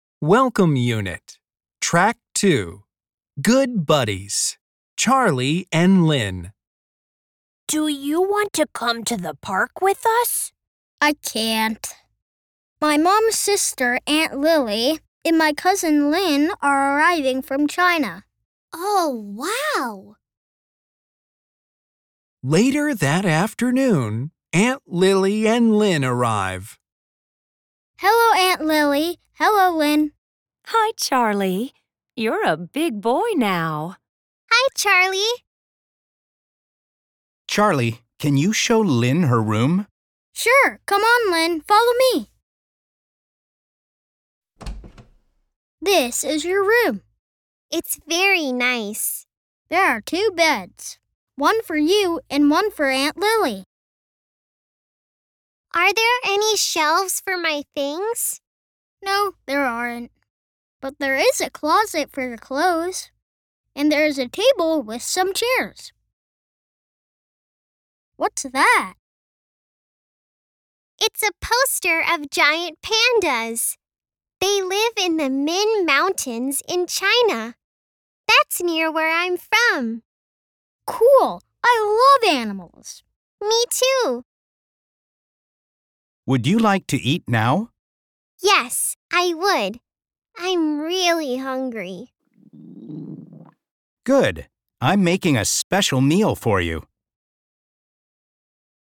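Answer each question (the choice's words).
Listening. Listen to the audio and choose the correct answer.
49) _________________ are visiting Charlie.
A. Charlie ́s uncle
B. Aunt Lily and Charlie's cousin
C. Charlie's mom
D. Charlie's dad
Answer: Aunt Lily and Charlie's cousin

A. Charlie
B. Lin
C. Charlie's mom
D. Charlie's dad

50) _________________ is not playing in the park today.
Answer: Charlie

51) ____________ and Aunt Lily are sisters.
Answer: Charlie's mom

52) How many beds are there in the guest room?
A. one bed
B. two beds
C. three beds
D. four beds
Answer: two beds

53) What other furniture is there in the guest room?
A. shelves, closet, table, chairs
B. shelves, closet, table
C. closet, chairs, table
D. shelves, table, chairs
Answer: closet, chairs, table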